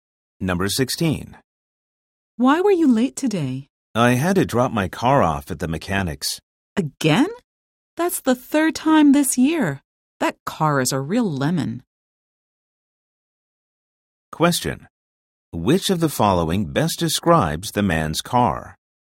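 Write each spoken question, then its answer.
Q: Which of the following best describes the man's car?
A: It is unreliable and keeps breaking down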